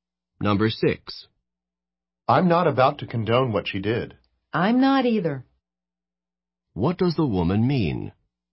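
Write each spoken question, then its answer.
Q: What does the woman mean?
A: She also does not approve of what she did.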